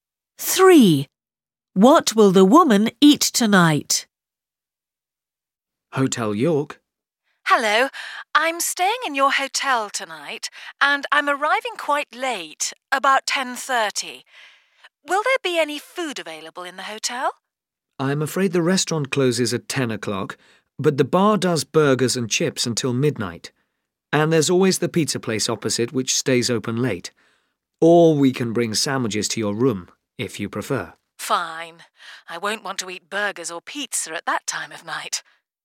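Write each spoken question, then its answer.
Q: Three. What will the woman eat tonight?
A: sandwiches in her room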